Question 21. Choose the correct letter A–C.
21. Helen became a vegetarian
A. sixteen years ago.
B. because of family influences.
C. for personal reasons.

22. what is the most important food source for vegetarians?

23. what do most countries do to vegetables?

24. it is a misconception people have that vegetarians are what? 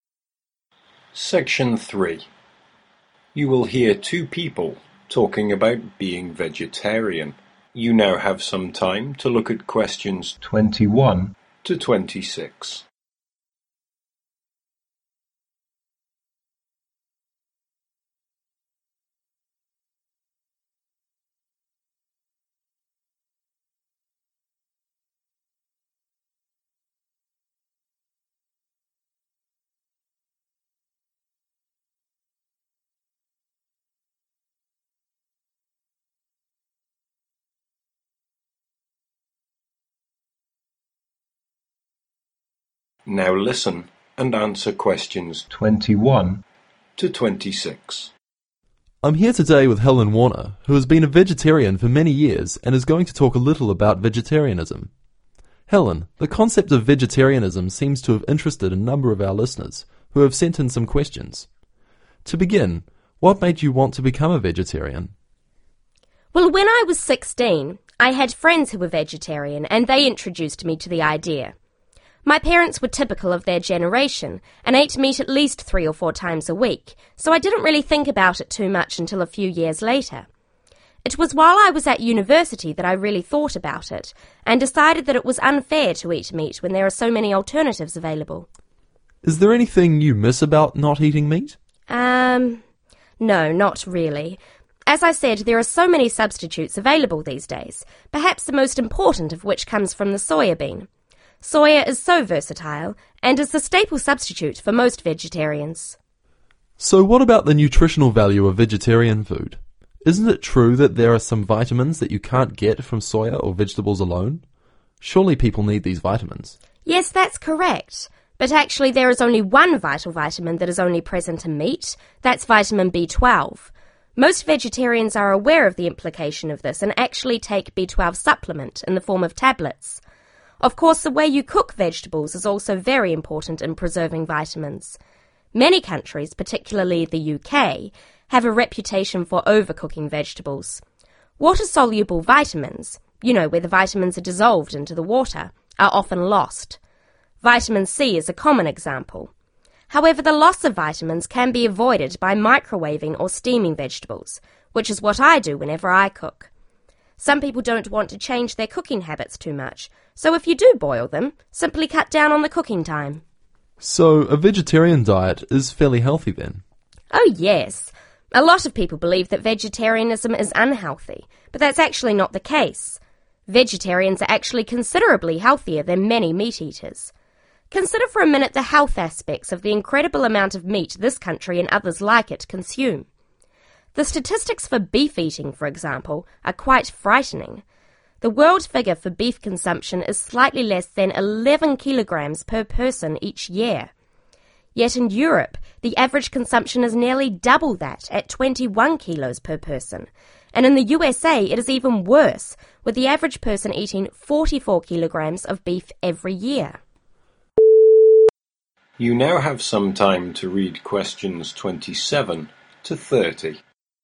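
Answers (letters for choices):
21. C
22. soya (bean)
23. overcook them
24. unhealthy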